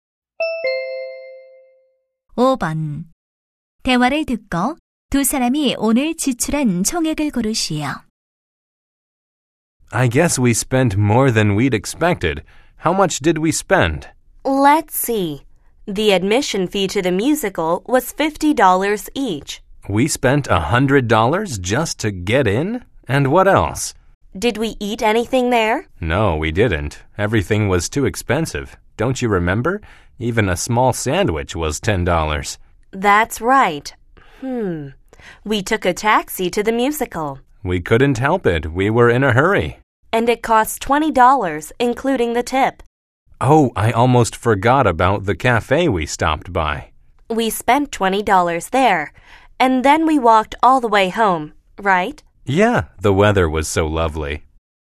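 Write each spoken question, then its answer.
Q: 대화를 듣고 두 사람이 오늘 지출한 총액을 고르시오.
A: 140달러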